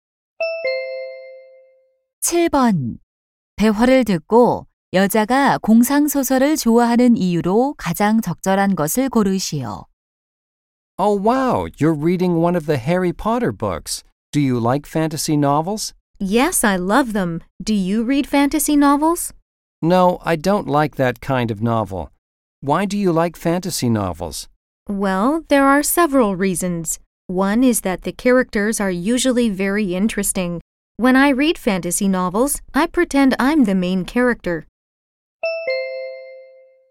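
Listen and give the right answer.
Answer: 등장인물들이 흥미로워서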